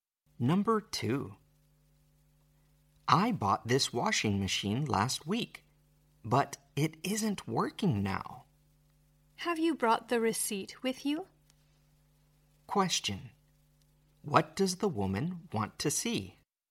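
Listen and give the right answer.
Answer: The receipt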